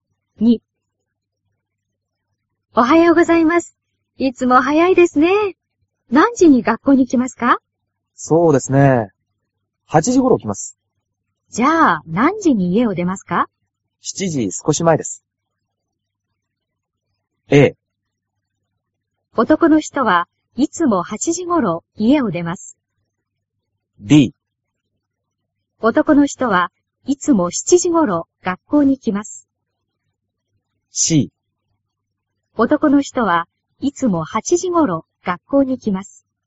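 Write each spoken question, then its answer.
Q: 男の人はいつも8時頃学校に来ます。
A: C: 男の人はいつも8時頃学校に来ます。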